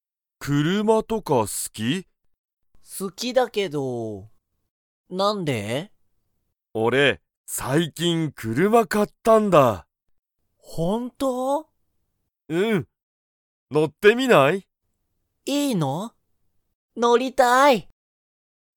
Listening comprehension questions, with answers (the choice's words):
まさきは、車(くるま)が好(す)きですか?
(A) はい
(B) いいえ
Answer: はい

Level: Level 1